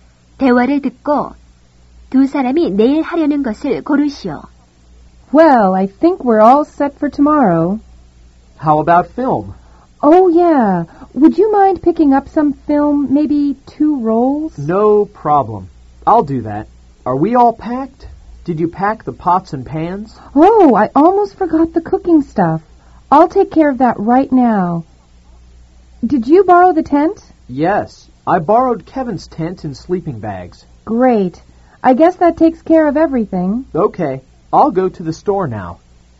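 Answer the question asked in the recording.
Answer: 캠핑 가기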